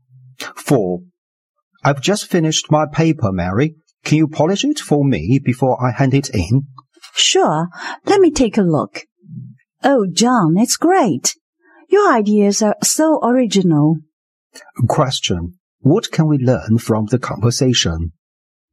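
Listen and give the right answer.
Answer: Mary thinks John's paper is original and great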